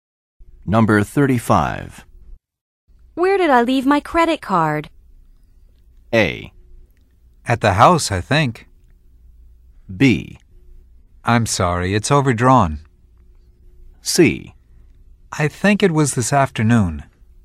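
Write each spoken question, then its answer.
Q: Where did I leave my credit card?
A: A: At the house, I think.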